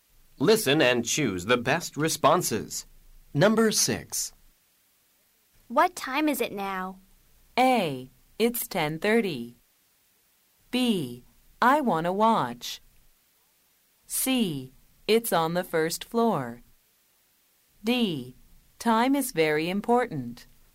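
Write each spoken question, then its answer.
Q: What time is it now?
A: A: It's 10:30.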